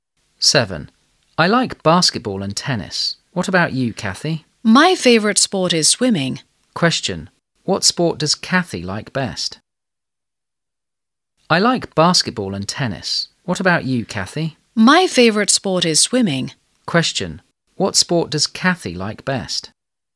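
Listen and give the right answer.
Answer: Swimming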